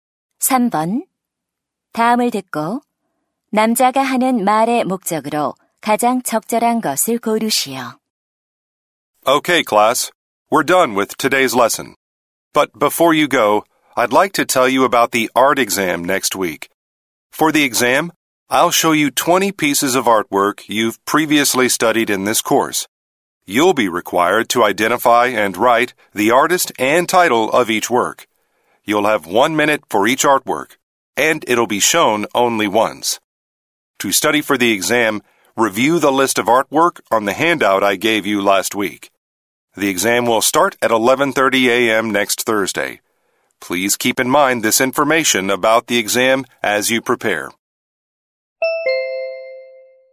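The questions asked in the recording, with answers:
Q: 다음을 듣고 남자가 하는 말의 목적으로 가장 적절한 것을 고르시오.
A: 다음 주 미술 시험에 대해 안내하려고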